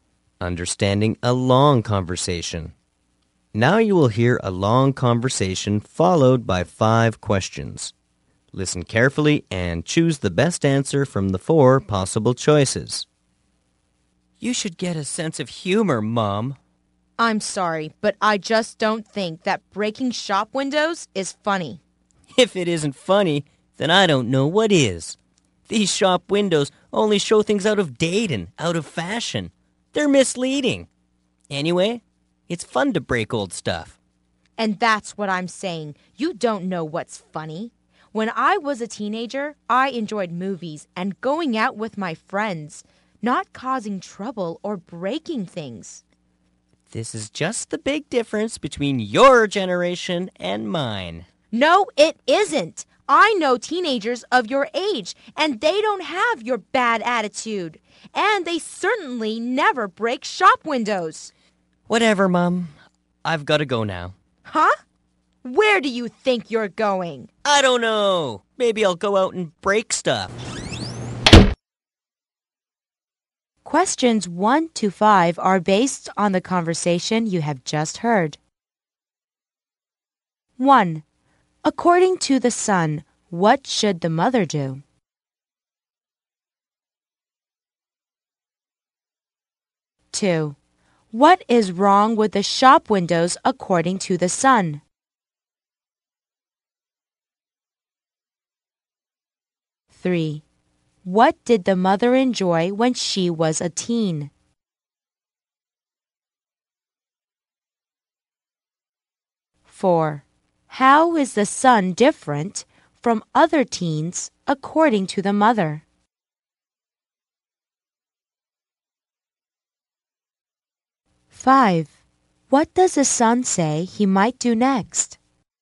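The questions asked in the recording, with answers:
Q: According to the son, what should the mother do?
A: Get a sense of humor.

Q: What is wrong with the shop windows according to the sun?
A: They show out-of-date, out-of-fashion things and are misleading.

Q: What did the mother enjoy when she was a teen?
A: Movies and going out with her friends.

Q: How is the sun different from other teens according to the mother?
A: He has a bad attitude and breaks shop windows.

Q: What does the son say he might do next?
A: Go out and break stuff.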